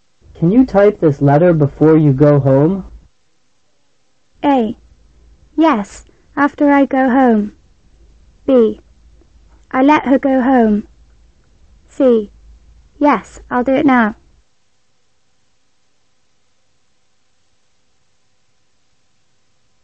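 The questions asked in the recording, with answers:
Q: Can you type this letter before you go home?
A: C: Yes, I'll do it now.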